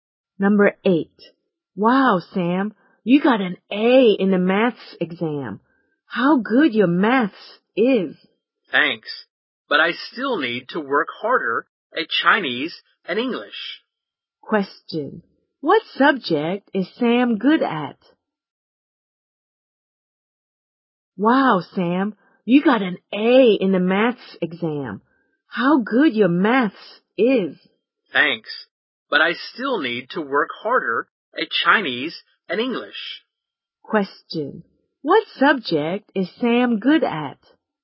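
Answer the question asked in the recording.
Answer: Maths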